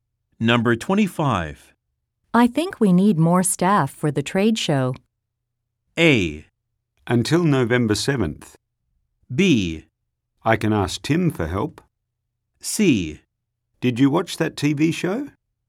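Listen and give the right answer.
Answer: B: I can ask Tim for help.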